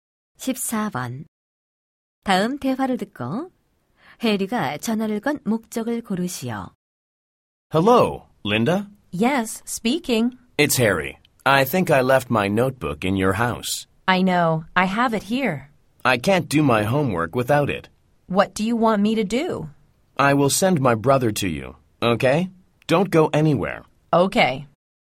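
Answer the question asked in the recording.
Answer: 두고 온 공책을 동생 편에 받으려고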